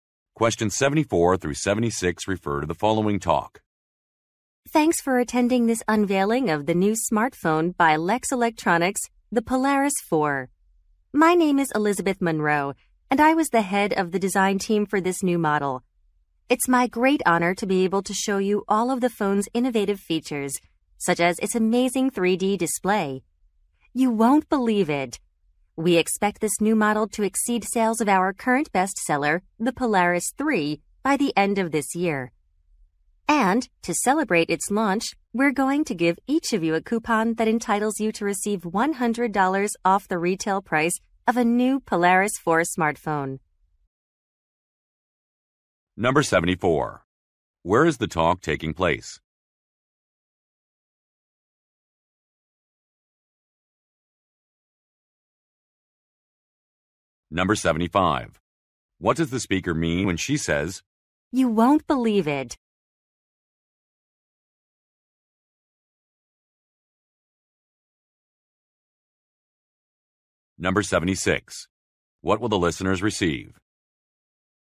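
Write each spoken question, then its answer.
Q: Where is the talk taking place?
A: At a product launch for a new smartphone

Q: What does the speaker mean when she says,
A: The 3D display is very impressive

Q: What will the listeners receive?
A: A coupon for $100 off the Polaris 4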